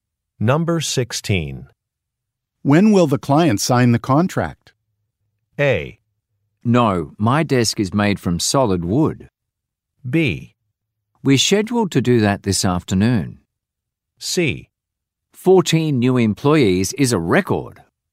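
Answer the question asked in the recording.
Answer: B: We're scheduled to do that this afternoon.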